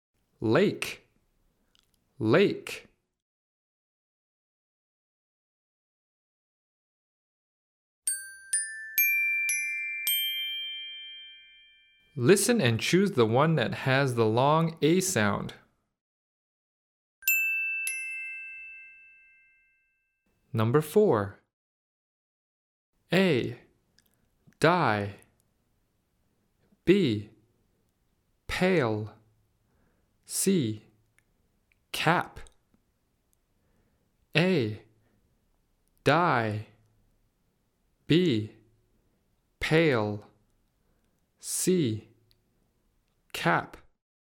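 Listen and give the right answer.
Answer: B: Pale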